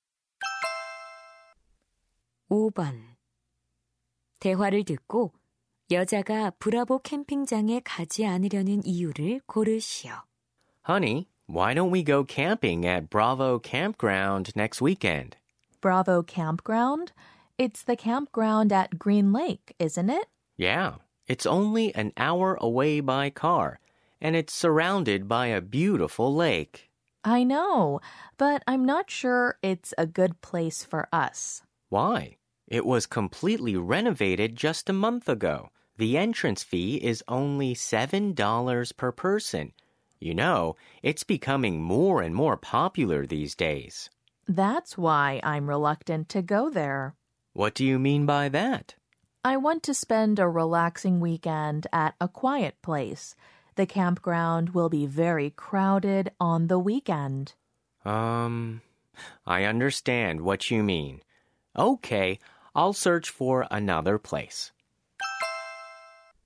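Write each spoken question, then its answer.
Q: 대화를 듣고 여자가 브라보 캠핑장에 가지 않으려는 이유를 고르시오.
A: 주말에 붐빌 것이라서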